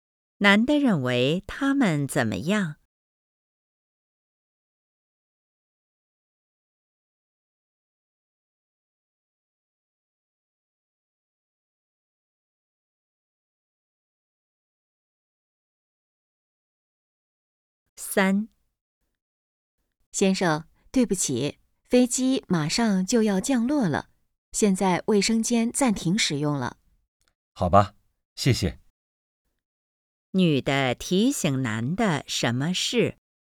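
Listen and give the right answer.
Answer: 飞机马上降落,卫生间暂停使用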